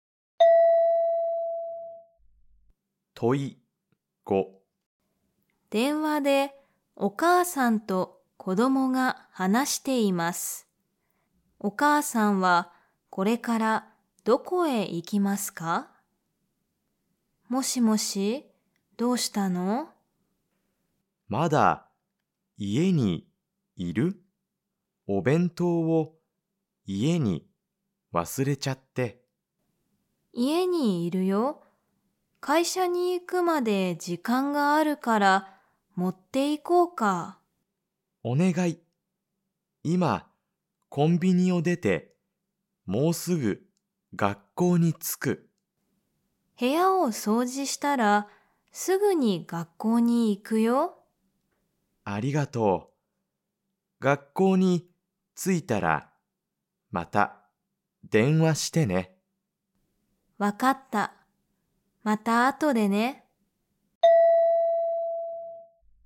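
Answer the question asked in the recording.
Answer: 学校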